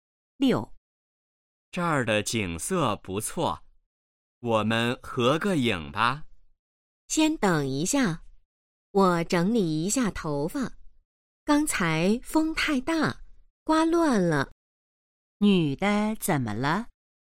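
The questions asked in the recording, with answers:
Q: 女的怎么了?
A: 头发被风刮乱了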